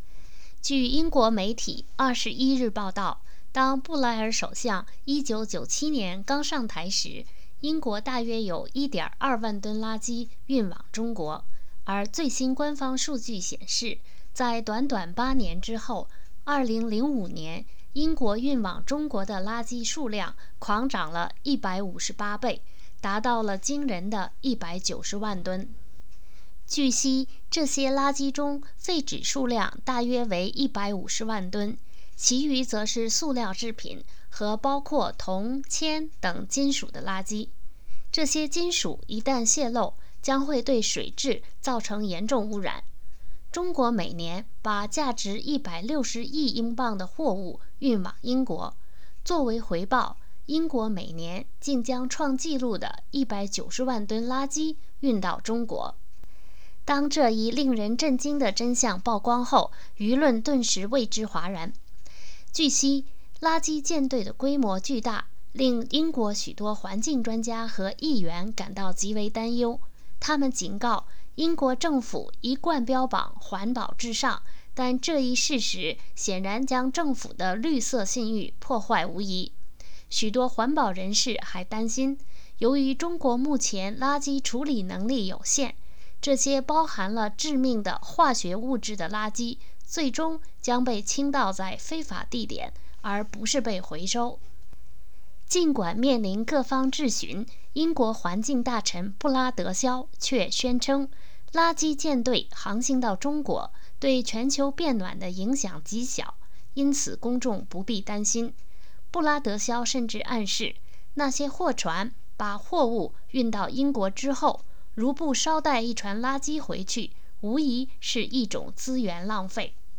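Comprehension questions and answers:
Please answer the following questions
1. 2005年英国运到中国的垃圾数量是多少?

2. 英国运到中国的都是什么垃圾?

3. 中国每年运到英国的货物价值多少?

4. 环保人士担心什么?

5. 布拉德肖对运送垃圾到中国的看法是什么?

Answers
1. 190万吨
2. 废纸(约150万吨)、塑料制品和含铜、铅等金属的垃圾
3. 160亿英镑
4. 中国垃圾处理能力有限,这些含致命化学物质的垃圾最终会被倾倒在非法地点,而不是被回收
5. 对全球变暖影响极小,公众不必担心;货船回程不捎带垃圾是资源浪费

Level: 3rd Year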